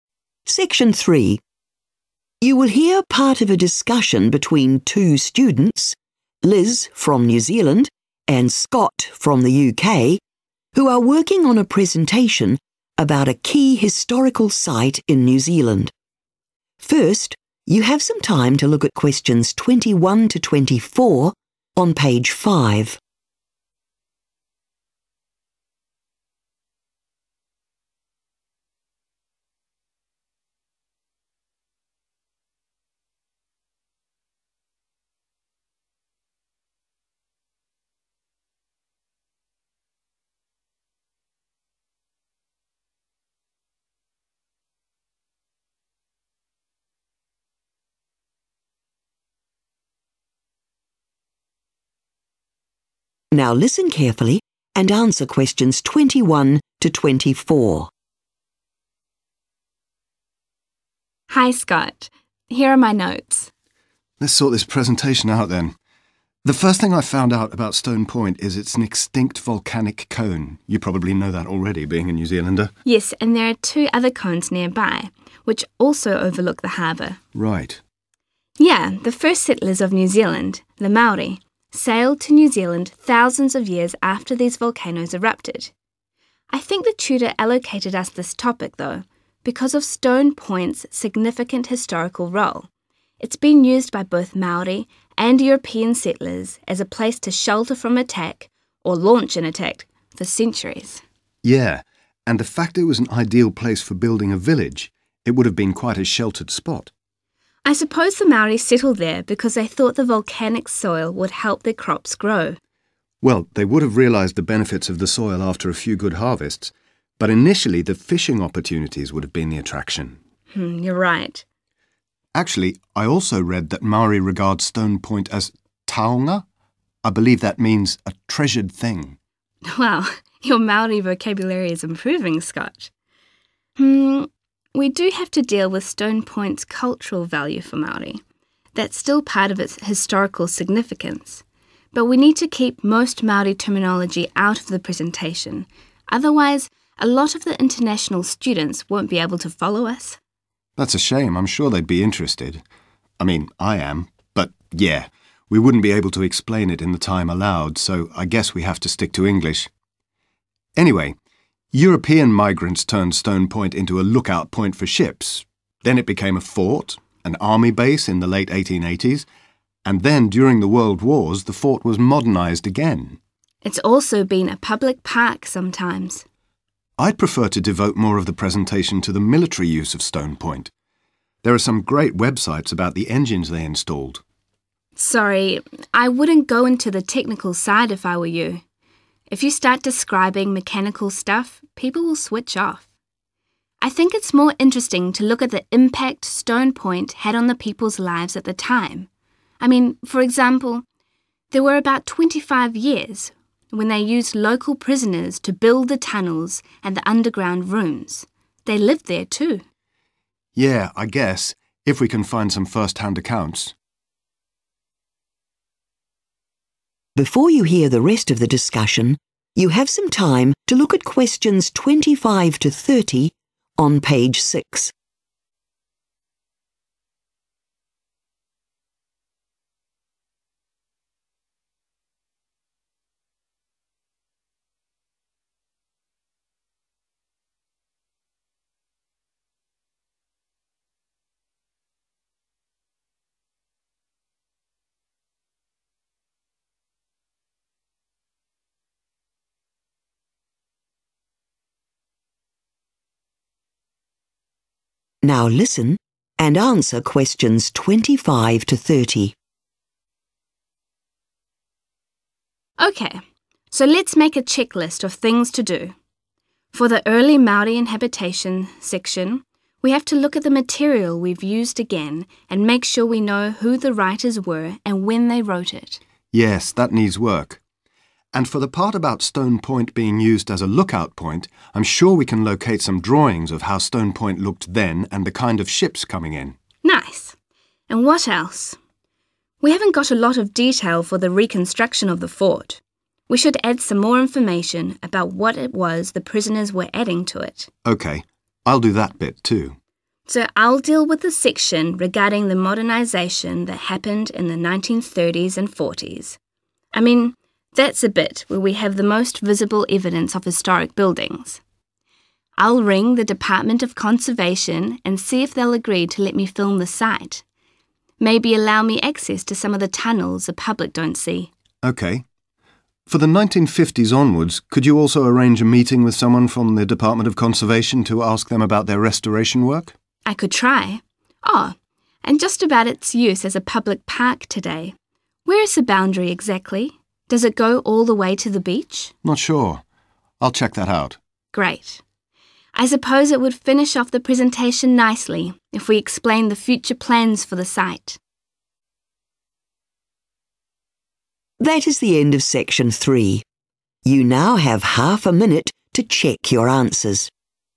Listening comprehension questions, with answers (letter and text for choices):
Choose the correct letter A, B or C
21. According to Liz, Stone Point played a key role in local history because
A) it was used for defence or attack purposes.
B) it was the landing point for the first Maori settlers.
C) it was developed as a commercial port.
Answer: A) it was used for defence or attack purposes.

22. Scott and Liz agree that Maori originally chose to inhabit Stone Point because of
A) its rich soil.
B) the supply of fish.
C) available building materials.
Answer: B) the supply of fish.

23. Scott and Liz agree that using Maori terminology in their presentation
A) will be of interest to international students.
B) is required as a component of their research.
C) would be best avoided.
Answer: C) would be best avoided.

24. When Scott mentions the engines at Stone Point, Liz advises him to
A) focus on the human aspect instead.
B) check the accuracy of specific dates.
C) explain complex technical language.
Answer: A) focus on the human aspect instead.

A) provide further description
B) find images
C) set up an interview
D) check author's details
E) check the exact location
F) obtain official permission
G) be more objective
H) reduce it in length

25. Early Maori inhabitation of Stone Point .................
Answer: D) check author's details

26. The use of Stone Point as a lookout point .................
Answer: B) find images

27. The reconstruction of the fort .................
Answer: A) provide further description

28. Modernisation of the fort in the 1930s–40s .................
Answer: F) obtain official permission

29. Uses of Stone Point from 1950s to the present day .................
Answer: C) set up an interview

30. The use of Stone Point as a public park .................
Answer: E) check the exact location